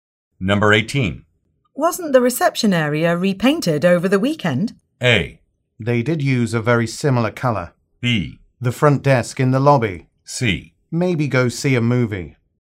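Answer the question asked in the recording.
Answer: A: They did use a very similar color.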